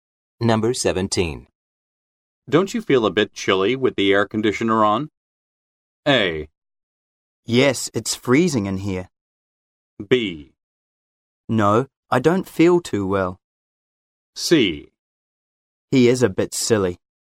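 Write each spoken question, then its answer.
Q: Don't you feel a bit chilly with the air conditioner on?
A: A: Yes, it's freezing in here.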